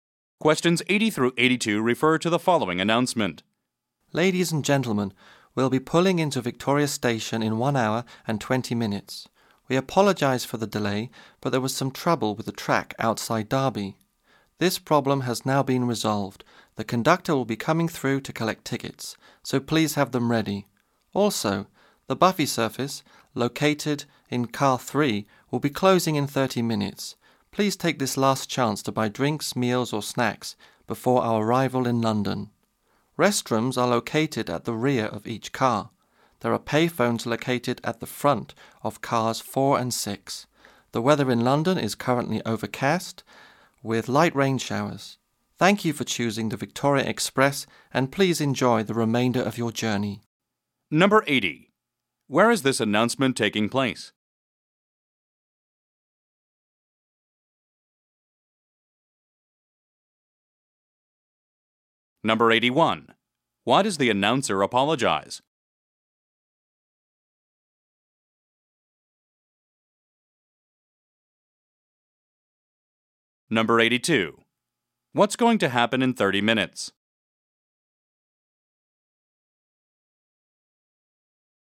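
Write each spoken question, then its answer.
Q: Where is this announcement taking place?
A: On a train

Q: Why does the announcer apologize?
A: For the delay caused by track trouble outside Derby

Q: What's going to happen in 30 minutes?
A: The buffet service will close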